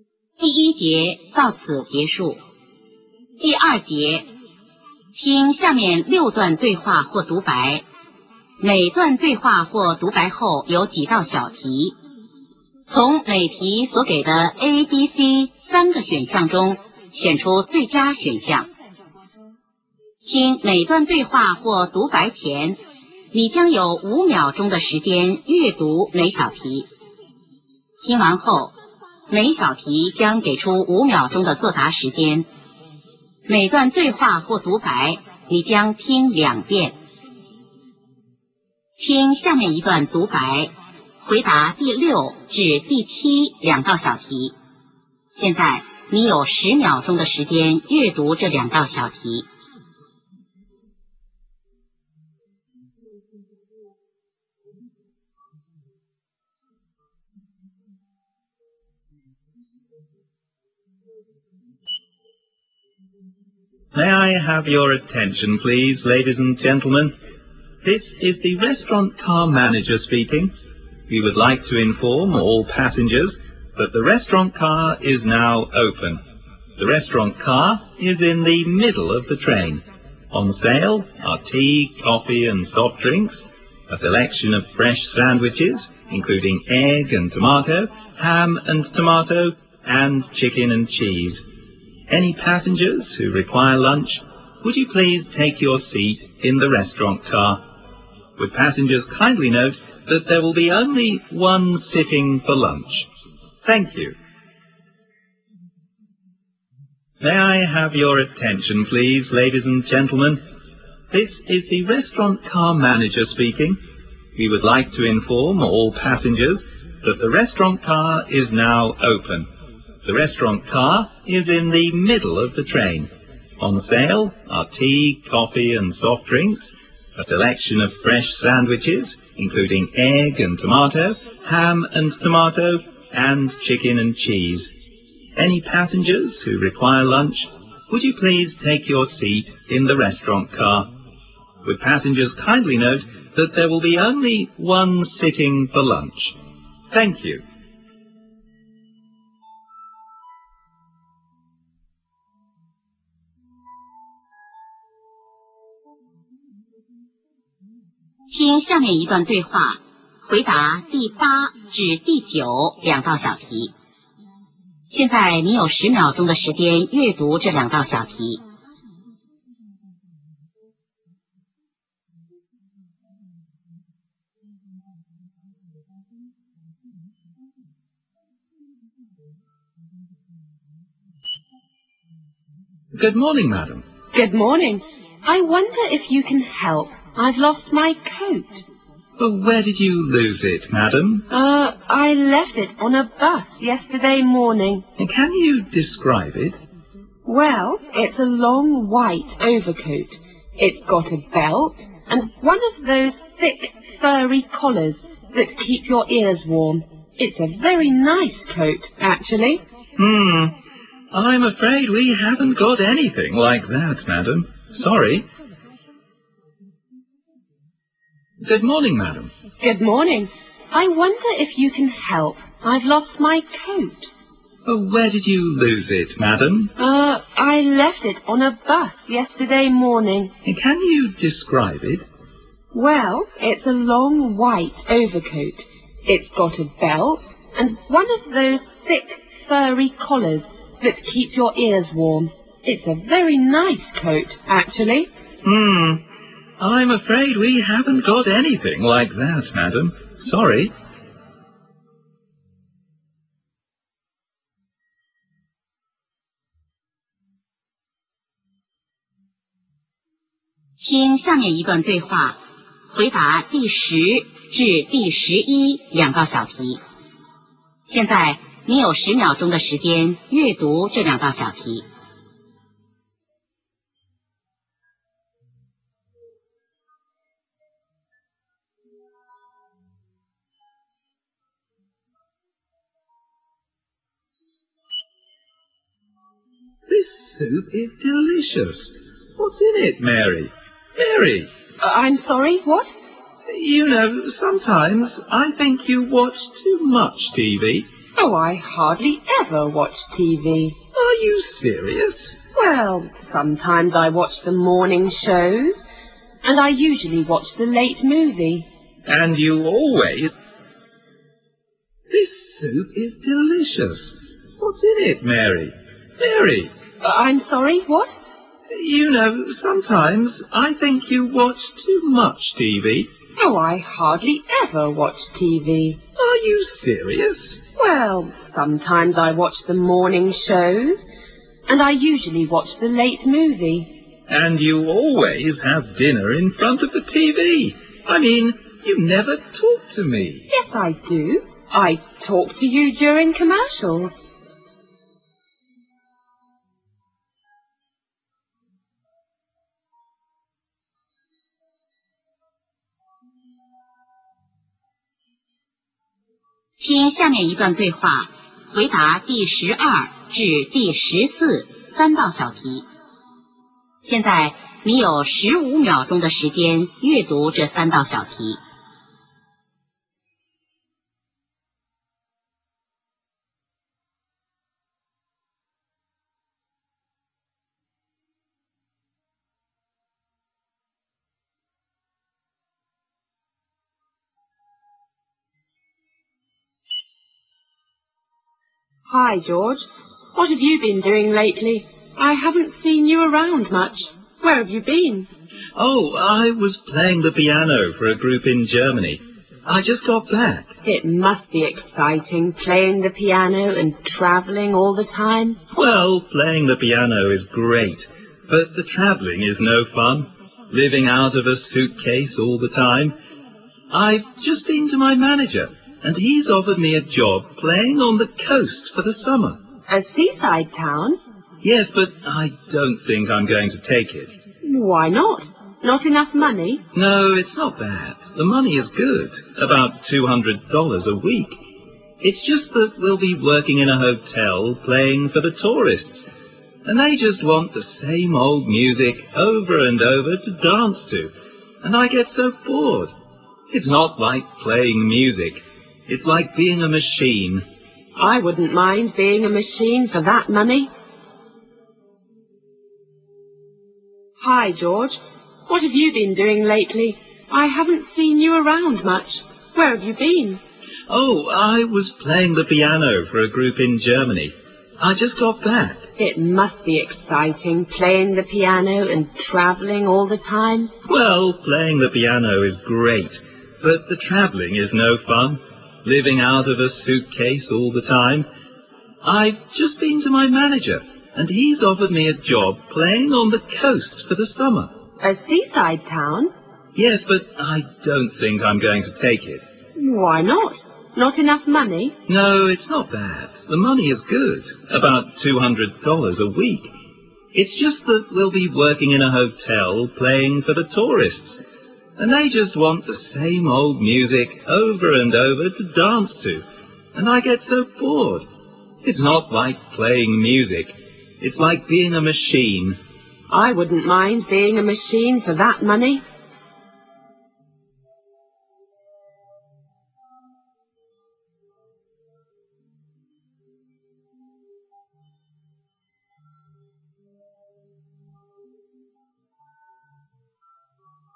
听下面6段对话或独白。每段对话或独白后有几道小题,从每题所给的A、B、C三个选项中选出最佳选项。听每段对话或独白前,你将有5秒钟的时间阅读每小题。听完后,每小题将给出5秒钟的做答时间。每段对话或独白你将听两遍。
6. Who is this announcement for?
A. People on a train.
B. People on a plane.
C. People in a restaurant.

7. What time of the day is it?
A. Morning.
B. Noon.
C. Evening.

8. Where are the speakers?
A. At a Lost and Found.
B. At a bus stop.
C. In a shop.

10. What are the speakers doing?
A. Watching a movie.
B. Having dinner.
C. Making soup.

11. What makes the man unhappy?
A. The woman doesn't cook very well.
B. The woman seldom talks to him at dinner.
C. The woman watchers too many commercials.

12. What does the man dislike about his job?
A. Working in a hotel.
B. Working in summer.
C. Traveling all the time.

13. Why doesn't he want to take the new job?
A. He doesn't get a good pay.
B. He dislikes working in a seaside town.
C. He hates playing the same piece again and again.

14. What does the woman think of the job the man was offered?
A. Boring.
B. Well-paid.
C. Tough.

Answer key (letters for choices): 6A, 7B, 8A, 10B, 11B, 12C, 13C, 14B

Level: 高考